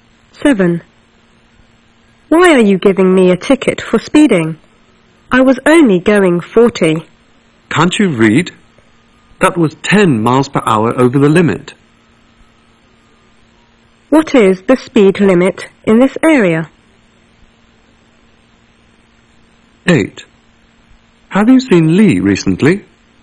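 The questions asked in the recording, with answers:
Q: What is the speed limit in this area?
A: 30 miles per hour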